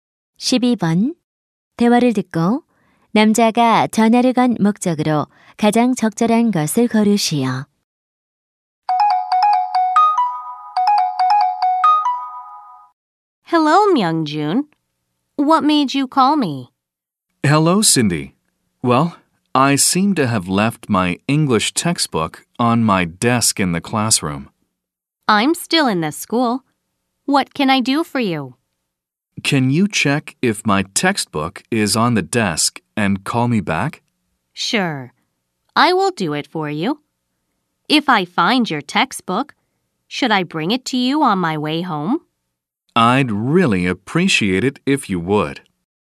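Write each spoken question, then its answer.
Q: 대화를 듣고 남자가 전화를 건 목적으로 가장 적절한 것을 고르시오.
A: 교과서가 책상 위에 있는지 확인해 달라고 부탁하려고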